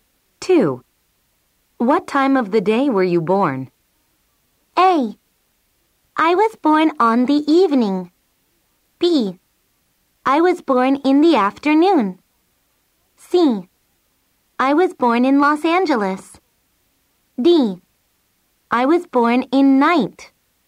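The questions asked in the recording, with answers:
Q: What time of the day were you born?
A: B: I was born in the afternoon.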